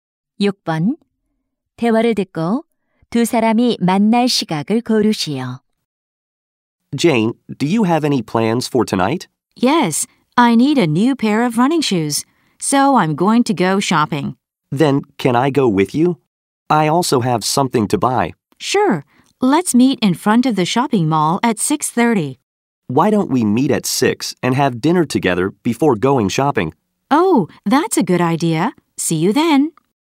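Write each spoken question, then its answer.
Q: 대화를 듣고 두 사람이 만날 시각을 고르시오.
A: 6시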